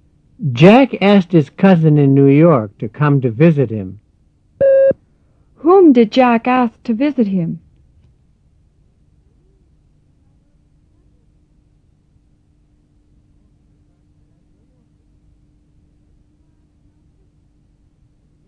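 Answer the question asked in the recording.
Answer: His cousin in New York.

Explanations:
Jack asked his cousin in New York to come to visit him.

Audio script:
Jack asked his cousin in New York to come to visit him. Whom did Jack ask to visit him?

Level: 入门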